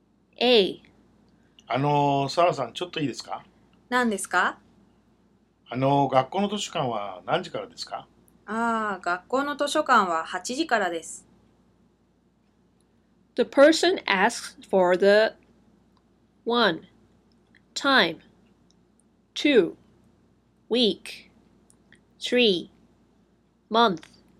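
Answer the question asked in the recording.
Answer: 1: Time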